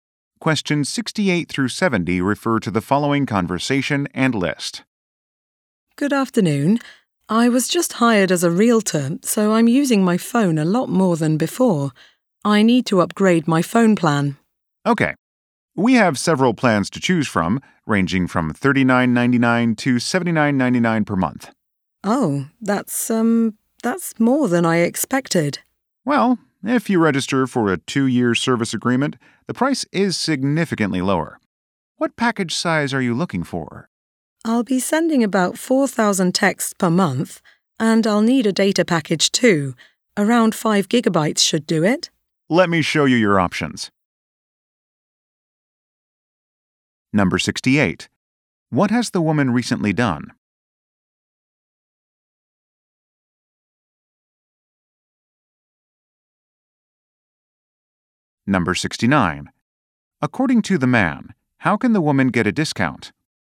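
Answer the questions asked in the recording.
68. She was hired as a realtor
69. By signing a 2-year service agreement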